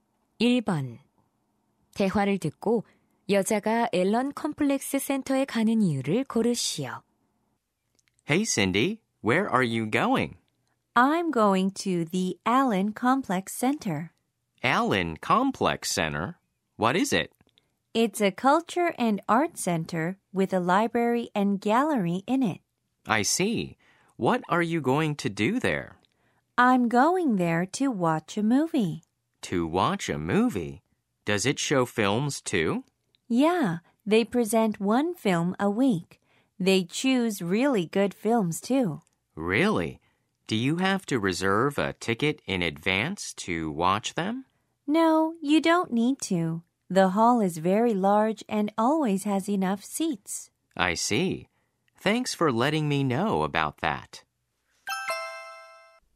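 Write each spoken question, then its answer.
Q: 대화를 듣고 여자가 앨런 컴플렉스 센터에 가는 이유를 고르시오.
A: 영화를 보려고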